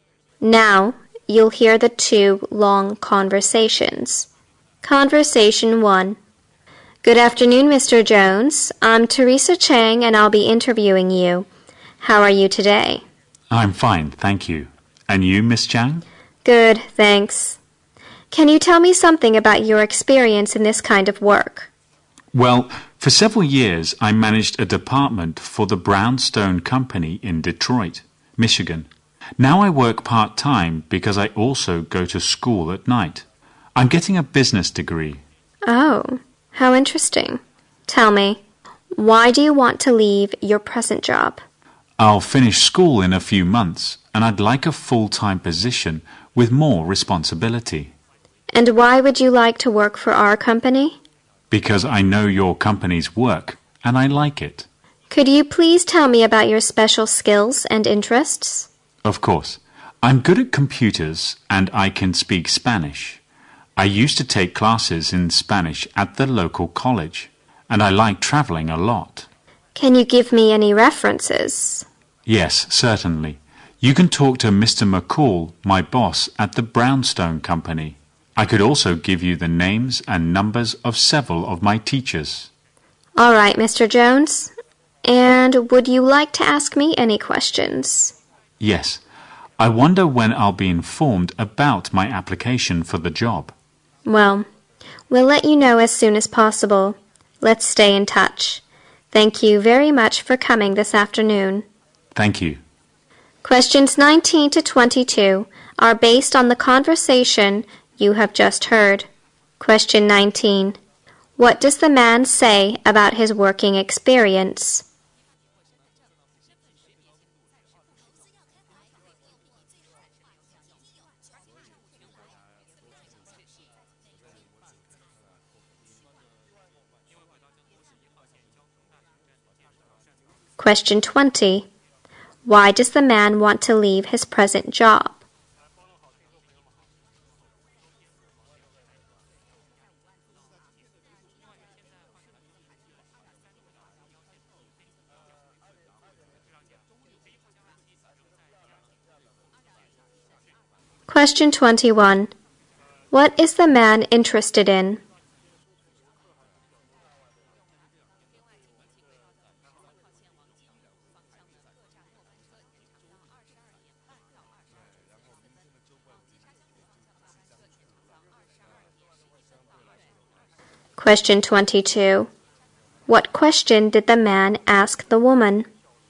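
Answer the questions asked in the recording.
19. He managed a department at the Brownstone Company in Detroit for several years.
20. He wants a full-time job with more responsibility.
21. Computers, Spanish and traveling
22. When he would hear about his job application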